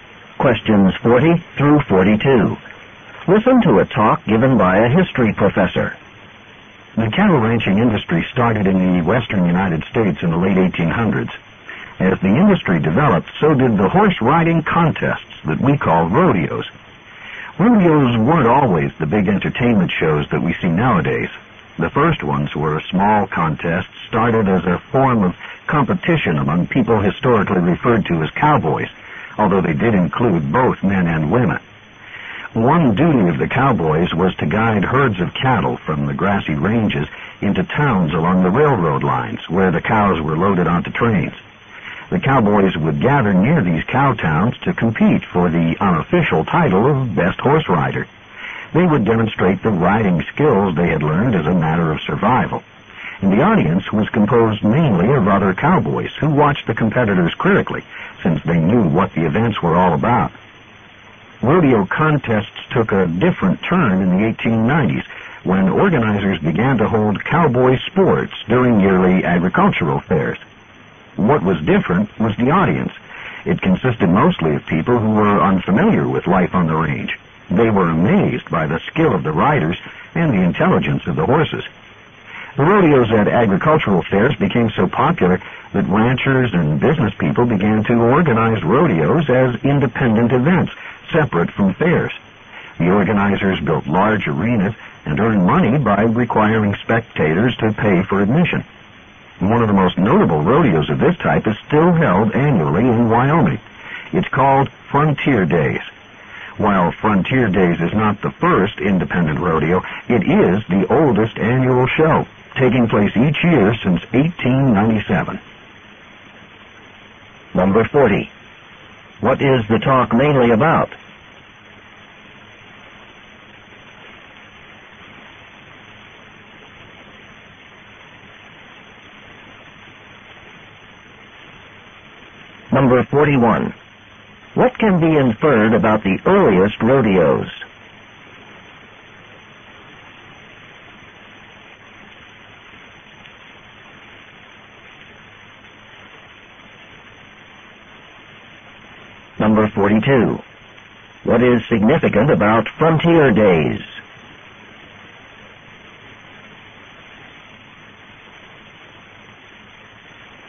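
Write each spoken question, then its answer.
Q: What is the talk mainly about?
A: How rodeos began and developed

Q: What is significant about Frontier Days?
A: It is the oldest annual rodeo, held every year since 1897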